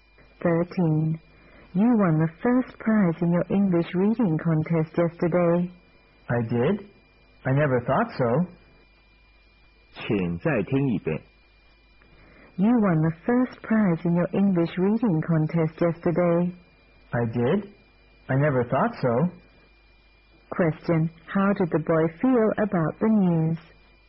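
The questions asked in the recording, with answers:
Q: Question. How did the boy feel about the news?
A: Surprised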